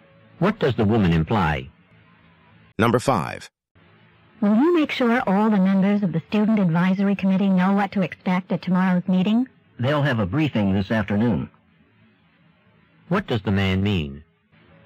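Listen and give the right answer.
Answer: The committee members will be briefed this afternoon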